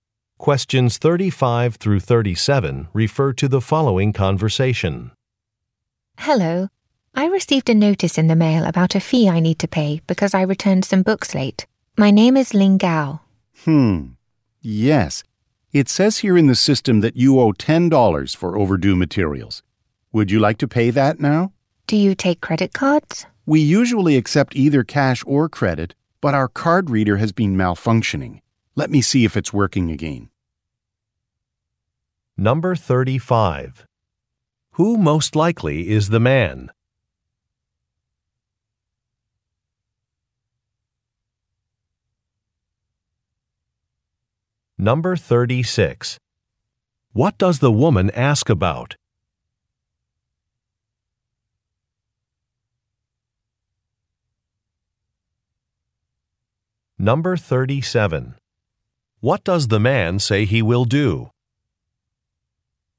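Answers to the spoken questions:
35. A librarian
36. Whether they take credit cards
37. Check if the card reader is working again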